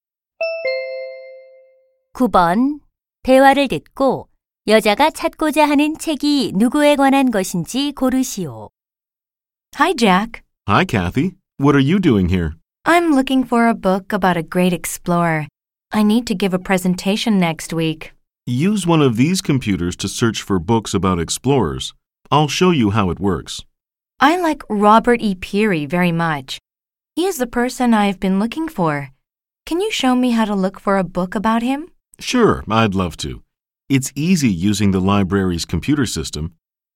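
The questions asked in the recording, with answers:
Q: 대화를 듣고 여자가 찾고자 하는 책이 누구에 관한 것인지 고르시오.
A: Robert E. Peary (탐험가)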